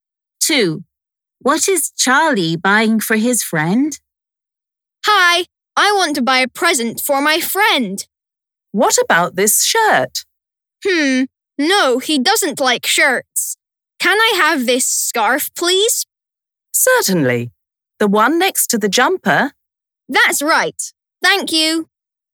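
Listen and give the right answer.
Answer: a scarf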